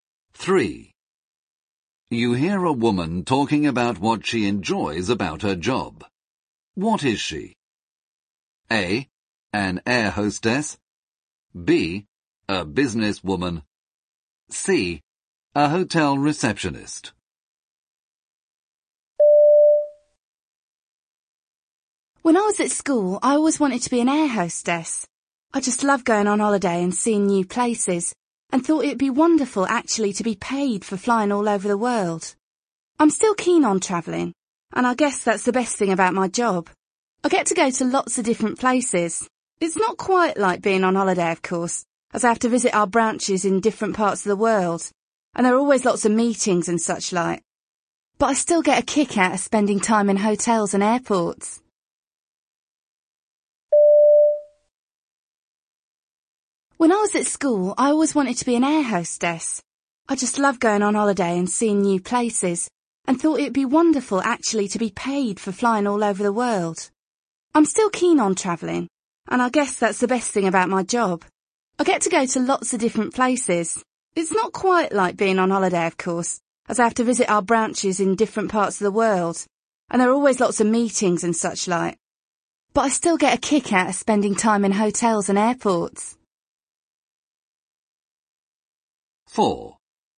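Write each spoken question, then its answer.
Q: What is she?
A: B: A businesswoman.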